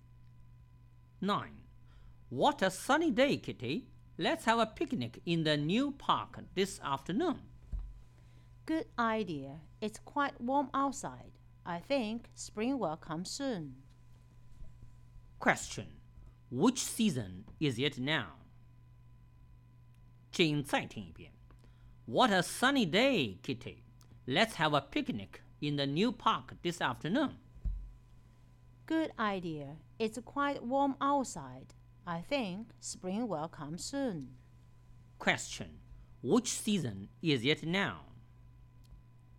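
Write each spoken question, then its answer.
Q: Which season is it now?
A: Winter (late winter, before spring)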